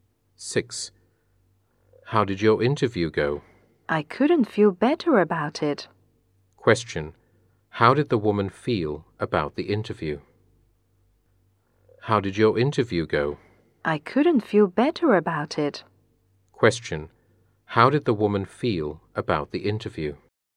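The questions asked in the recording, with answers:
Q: How did the woman feel about the interview?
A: She felt it went very well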